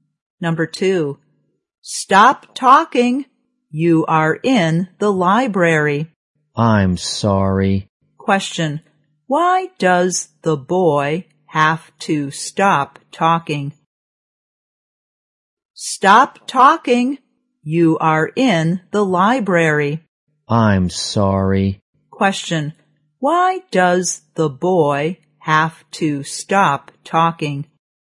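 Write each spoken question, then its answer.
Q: why does the boy have to stop talking?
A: Because he is in the library.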